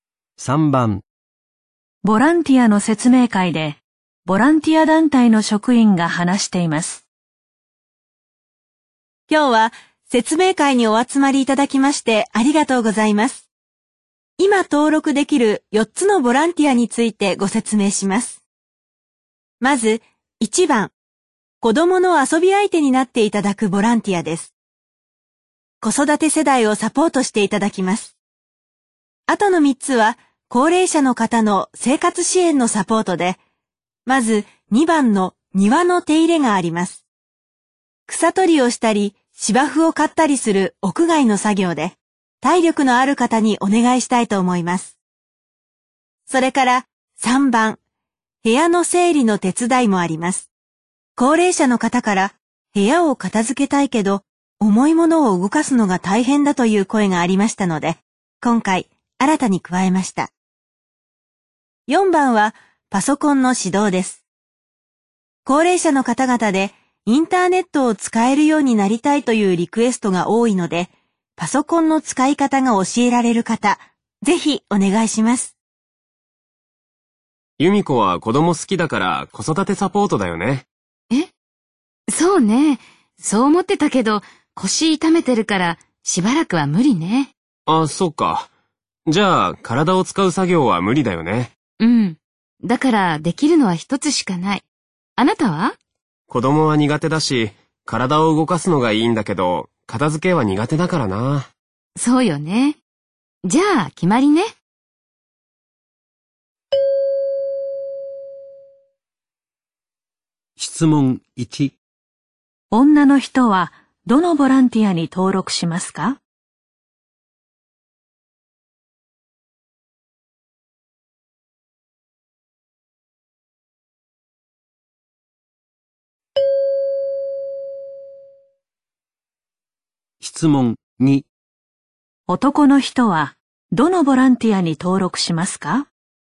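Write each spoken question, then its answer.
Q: 女の人はどのボランティアに登録しますか?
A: パソコンの指導

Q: 男の人はどのボランティアに登録しますか?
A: 庭の手入れ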